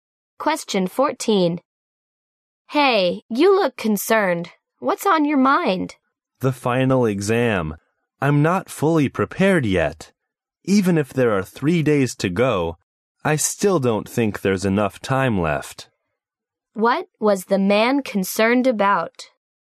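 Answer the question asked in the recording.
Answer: The final exam; he is not fully prepared.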